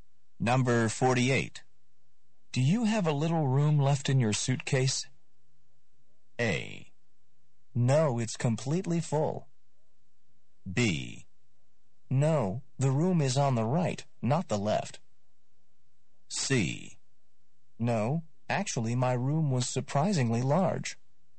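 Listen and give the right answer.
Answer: A: No, it's completely full.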